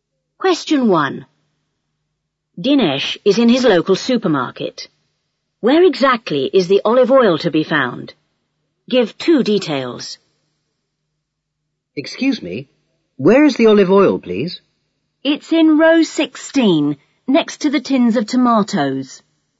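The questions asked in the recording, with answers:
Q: Where exactly is the olive oil to be found?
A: In row 16, next to the tins of tomatoes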